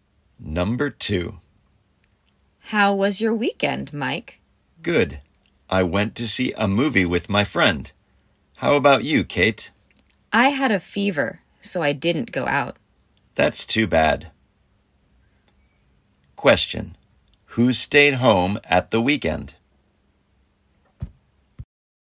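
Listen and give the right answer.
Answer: Kate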